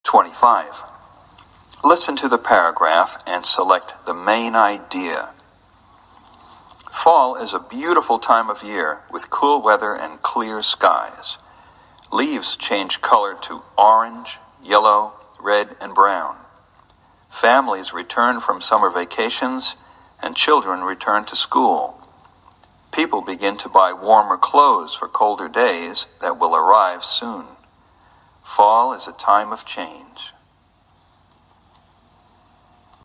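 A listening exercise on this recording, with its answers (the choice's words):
Listen to the paragraph and select the MAIN IDEA.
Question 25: Listen to the paragraph and select the MAIN IDEA.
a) There are many changes in the fall.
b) People need warm clothes in the fall.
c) In the fall, children return to school.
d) Leaves on trees change to orange and brown.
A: There are many changes in the fall.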